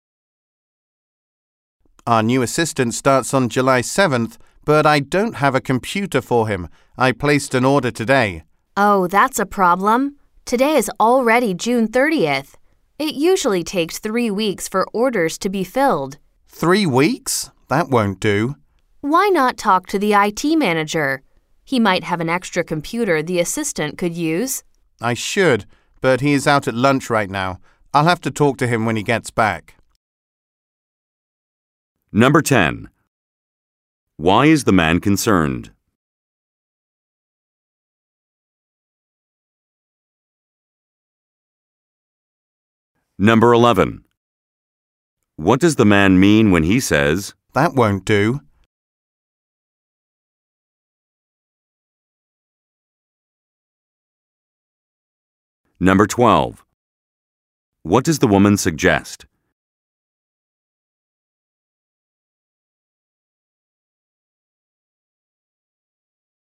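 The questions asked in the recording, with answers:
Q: Why is the man concerned?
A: The new assistant starts July 7th but there is no computer for him, and orders take 3 weeks.

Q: What does the man mean when he says, "That won't do"?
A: Waiting 3 weeks is too long.

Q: What does the woman suggest?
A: Talking to the IT manager about an extra computer.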